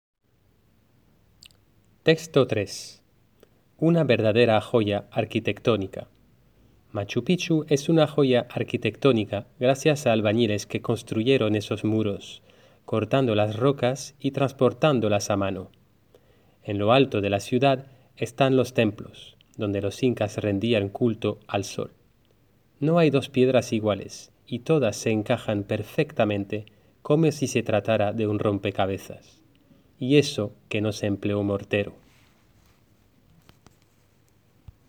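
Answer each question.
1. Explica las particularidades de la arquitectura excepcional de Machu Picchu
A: Los albañiles cortaron las rocas y las transportaron a mano; las piedras encajan perfectamente sin mortero

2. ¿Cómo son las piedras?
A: No hay dos piedras iguales y todas encajan perfectamente como un rompecabezas

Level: Classe de 3ème classique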